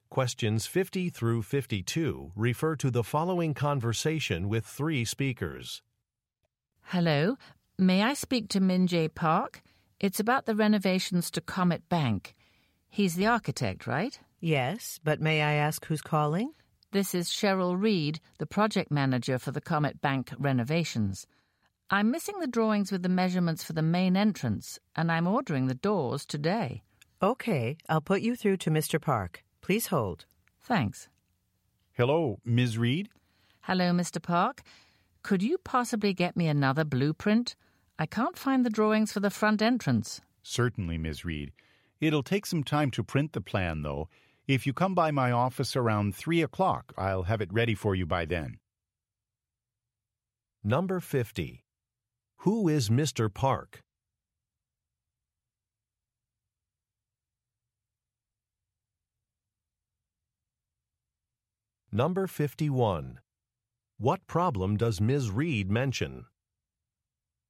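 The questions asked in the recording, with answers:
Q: Who is Mr. Park?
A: An architect

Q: What problem does Ms. Reed mention?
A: She is missing drawings for the main entrance

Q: What does Mr. Park ask Ms. Reed to do?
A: Come by his office around 3 o'clock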